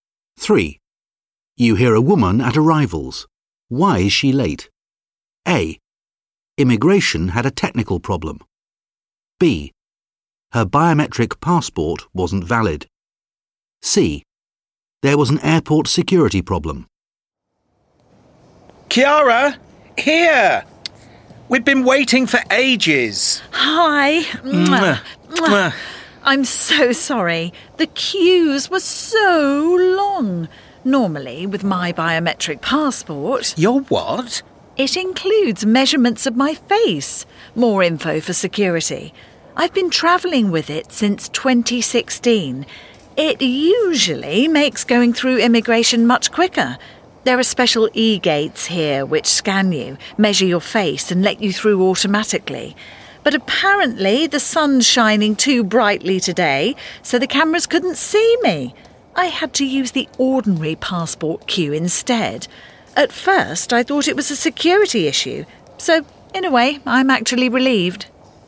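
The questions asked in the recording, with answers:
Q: Why is she late?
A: A: Immigration had a technical problem.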